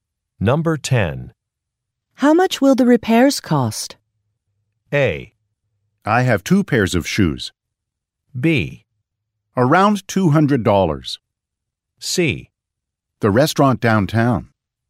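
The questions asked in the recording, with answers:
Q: How much will the repairs cost?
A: B: Around $200.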